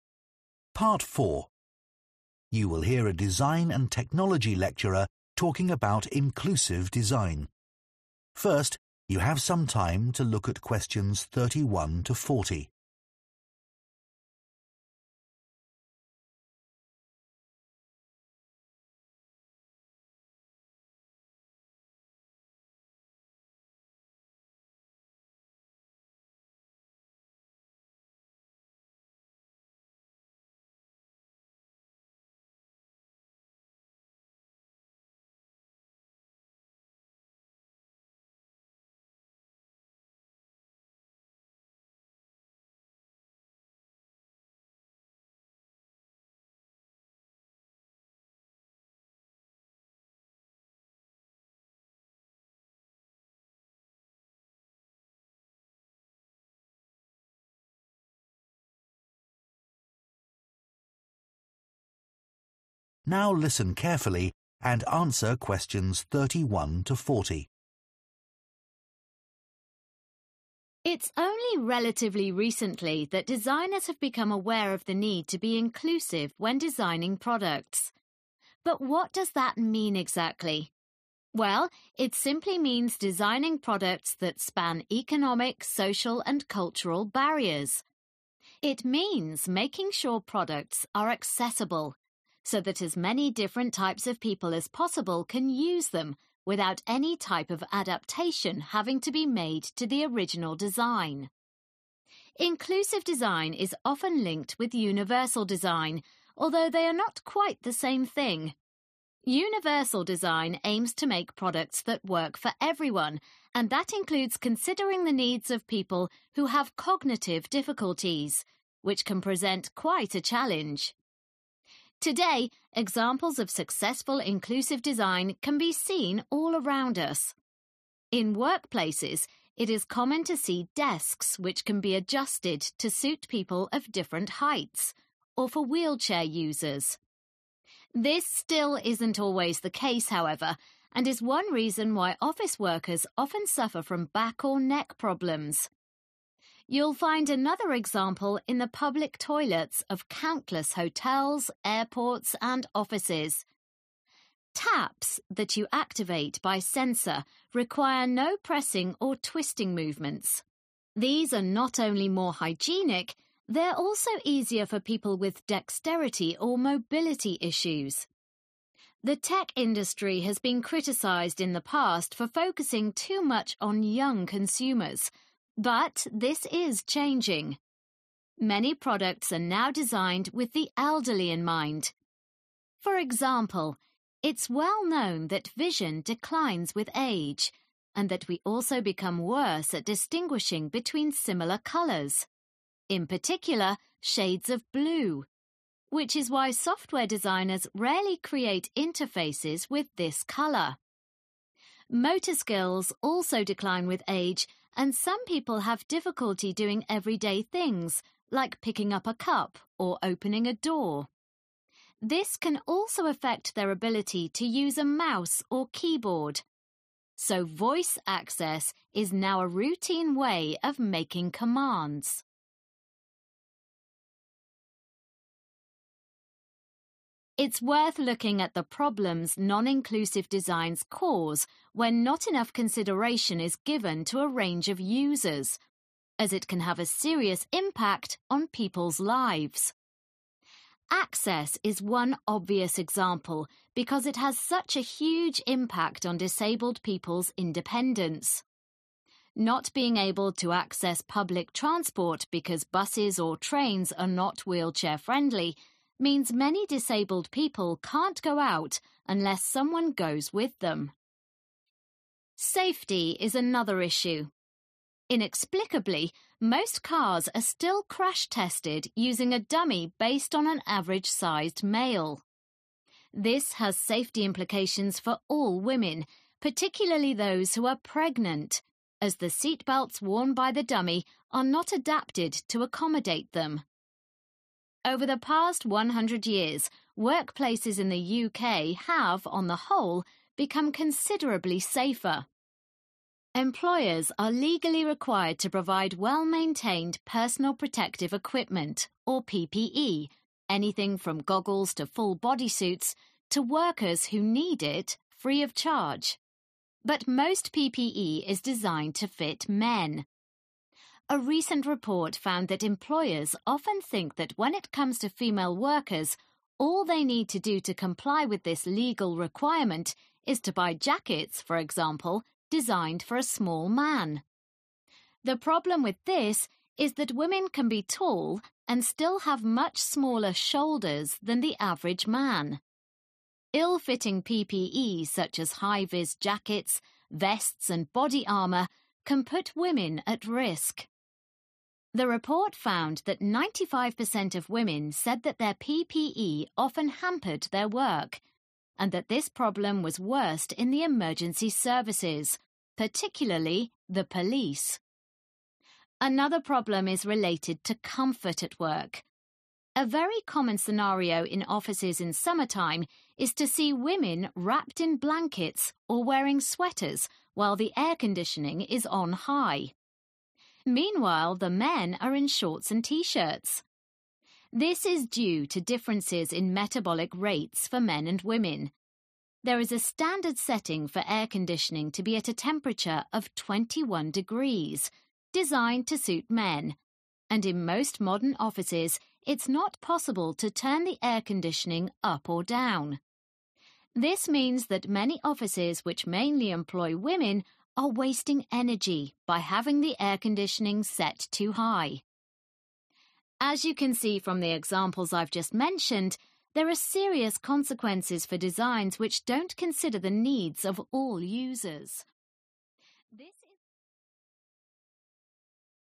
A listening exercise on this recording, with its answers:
Complete the notes below. Write ONE WORD ONLY for each answer.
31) Designing products that can be accessed by a diverse range of people without the need for any 31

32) Not the same as universal design: that is design for everyone, including catering for people with 32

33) which are adjustable, avoiding back or neck problems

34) in public toilets which are easier to use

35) Designers avoid using 35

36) People can make commands using a mouse, keyboard, or their 36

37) Seatbelts are especially problematic for 37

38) PPE jackets are often unsuitable because of the size of women's 38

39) PPE for female 39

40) The 40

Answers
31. adaptation
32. cognitive
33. desks
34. taps
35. blue
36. voice
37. pregnant
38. shoulders
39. police
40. temperature

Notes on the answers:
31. The transcript says that inclusive design makes sure products can be used by many different people without needing to change anything about the original product. Answer Explanation: The answer means a change that you have to make to something to use it. Reason For Correctness: The correct answer is 'adaptation' because in the context of inclusive design, it is important that products are made so that people can use them without having to change anything about the product. This means designers should create things that everyone can use as they are, without any adjustments or 'adaptations' needed.
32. The transcript says that universal design wants to help all people. It especially looks at people who have trouble thinking and understanding, which can be hard to do. Answer Explanation: The answer is 'cognitive'. This means the problems that people have with thinking or understanding things. Reason For Correctness: The correct answer is 'cognitive' because it is mentioned that universal design aims to consider the needs of people who have cognitive difficulties. This shows that the design needs to help people who have trouble with thinking or understanding, which is important for making products that everyone can use.
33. The transcript says that in workplaces, we often see desks that can change height. This is good because it helps different people, including those in wheelchairs, to work comfortably. Answer Explanation: The answer is 'desks'. This means the tables in an office where people work. Reason For Correctness: The correct answer is 'desks' because the transcript explains that adjustable desks are examples of inclusive design. These desks can be changed in height so that different people, like those who are taller or use wheelchairs, can use them comfortably. This helps avoid back or neck problems.
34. The transcript explains that taps can be used without pushing or turning them, which makes it cleaner and simpler for people who have trouble moving their hands. Answer Explanation: The answer is 'taps'. This means the handles or devices used to control water flow in sinks. Reason For Correctness: The correct answer is 'taps' because in the transcript, it talks about public toilets having taps that can be activated without pressing or twisting. This design makes it easier for people who have difficulty with movement.
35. The transcript says that as people get older, it is harder for them to see colors that are similar, especially shades of blue. Therefore, designers do not usually use this color in their designs for software. Answer Explanation: The answer is 'blue'. This means that the color blue is often not used in designs for elderly people. Reason For Correctness: The correct answer is 'blue' because the transcript mentions that designers avoid using this color in interfaces for the elderly. This is because older people can have trouble telling similar colors apart, especially different shades of blue.
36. So voice access is now a routine way of making commands Excerpt/Transcript Explanation: The transcript says that using your voice to give commands is now a common and normal way to do it. Answer Explanation: The answer is 'voice'. This means that people can use their voice to give commands. Reason For Correctness: The correct answer is 'voice' because the transcript mentions that as people get older, their motor skills decline, and some have difficulty using a mouse or keyboard. Therefore, voice access is now a regular method for making commands. This shows that voice is an important way for people, especially the elderly, to interact with technology.
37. The transcript says that safety is a big concern for women, especially if they are pregnant. The seatbelts used in tests do not fit them well, which can be dangerous. Answer Explanation: The answer is 'pregnant'. This means a woman who is going to have a baby. Reason For Correctness: The correct answer 'pregnant' is mentioned in relation to safety issues with car seatbelts. The transcript explains that crash tests usually use a dummy that looks like an average man, which is not safe for women, especially those who are pregnant. Thus, seatbelts can be a problem for pregnant women because they are not designed with their needs in mind.
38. the problem with this is that women can be tall and still have much smaller shoulders than the average man Excerpt/Transcript Explanation: The transcript says that some women can be tall but still have smaller shoulders than men. This means that equipment designed for men may not fit them well. Answer Explanation: The answer is 'shoulders'. This means the top parts of your arms where they connect to your body. Reason For Correctness: The correct answer is 'shoulders' because in the transcript, it discusses how personal protective equipment (PPE) designed for men may not fit women properly. The transcript explains that women can have different body shapes, and sometimes a woman's shoulders are smaller than a man's shoulders, which creates a problem when they try to wear equipment that is designed for men.
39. The transcript says that 95% of women reported that their protective equipment made it harder for them to do their jobs and that this issue is the biggest for police workers. Answer Explanation: The answer is 'police', which is a group of people who work to keep everyone safe and enforce the law. Reason For Correctness: The correct answer is 'police' because the transcript mentions that PPE (personal protective equipment) for female police officers is often not fit properly. This means the designs for police uniforms and safety equipment do not consider the needs of women, which can put them at more risk during their work.
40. The transcript says that in offices where many women work, the air conditioning is often too cold. This makes women feel uncomfortable, and it is not good for them. Answer Explanation: The answer is 'temperature'. It means how hot or cold something is, like the air inside a room. Reason For Correctness: The correct answer is 'temperature' because the transcript talks about how air conditioning is often set to a temperature that is too low for women in offices. It mentions that this temperature is usually 21 degrees, which is comfortable for men but not for many women. Since it implies that the standard setting of air conditioning doesn't fit the needs of all users, it shows how temperature can be an issue in the workplace.

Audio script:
It's only relatively recently that designers have become aware of the need to be inclusive when designing products. But what does that mean exactly? Well, it simply means designing products that span economic, social and cultural barriers. It means making sure products are accessible, so that as many different types of people as possible can use them, without any type of adaptation having to be made to the original design. Inclusive design is often linked with universal design, although they are not quite the same thing. Universal design aims to make products that work for everyone and that includes considering the needs of people who have cognitive difficulties, which can present quite a challenge. Today examples of successful inclusive design can be seen all around us. In workplaces it is common to see desks which can be adjusted to suit people of different heights or for wheelchair users This still isn't always the case, however, and is one reason why office workers often suffer from back or neck problems. You'll find another example in the public toilets of countless hotels, airports and offices. Taps that you activate by sensor require no pressing or twisting movements. These are not only more hygienic, they're also easier for people with dexterity or mobility issues. The tech industry has been criticised in the past for focusing too much on young consumers, but this is changing. Many products are now designed with the elderly in mind. For example, it's well known that vision declines with age and that we also become worse at distinguishing between similar colours, in particular shades of blue, which is why software designers rarely create interfaces with this colour. Motor skills also decline with age and some people have difficulty doing everyday things like picking up a cup or opening a door. This can also affect their ability to use a mouse or keyboard. So voice access is now a routine way of making commands. It's worth looking at the problems non-inclusive designs cause when not enough consideration is given to a range of users, as it can have a serious impact on people's lives. Access is one obvious example because it has such a huge impact on disabled people's independence. Not being able to access public transport because buses or trains are not wheelchair means many disabled people can go out unless someone goes with them. Safety is another issue. Inexplicably, most cars are still crash-tested using a dummy based on an average-sized male. This has safety implications for all women, particularly those who are pregnant, as the seatbelts worn by the dummy are not adapted to accommodate them. Over the past 100 years, workplaces in the UK have, on the whole, become considerably safer. Employers are legally required to provide well-maintained personal protective equipment, or PPE, anything from goggles to full bodysuits, to workers who need it, free of charge. But most PPE is designed to fit men. A recent report found that employers often think that when it comes to female workers, all they need to do to comply with this legal requirement is to buy jackets, for example, designed for a small man. The problem with this is that women can be tall and still have much smaller shoulders than the average man. Ill-fitting PPE such as high-vis jackets, vests and body armour can put women at risk. The report found that 95% of women said that their PPE often hampered their work and that this problem was worst in the emergency services, particularly the police. Another problem is related to comfort at work. A very common scenario in offices in summertime is to see women wrapped in blankets or wearing sweaters while the air conditioning is on high. Meanwhile, the men are in shorts and T-shirts. This is due to differences in metabolic rates for men and women. There is a standard setting for air conditioning to be at a temperature of 21 degrees designed to suit men and in most modern offices it is not possible to turn the air conditioning up or down. This means that many offices which mainly employ women are wasting energy by having the air conditioning set too high. As you can see from the examples I've just mentioned, there are serious consequences for designs which don't consider the needs of all users.